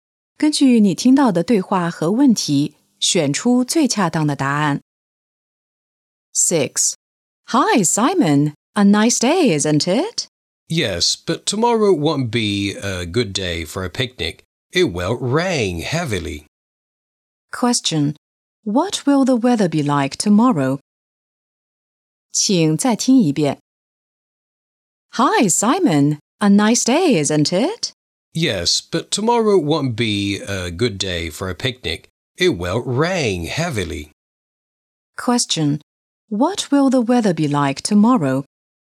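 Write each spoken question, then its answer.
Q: What will the weather be like tomorrow?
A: It will rain heavily (rainy).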